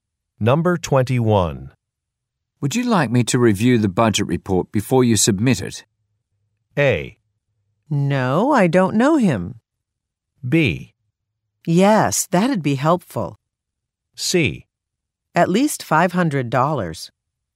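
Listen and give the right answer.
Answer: B: Yes, that'd be helpful.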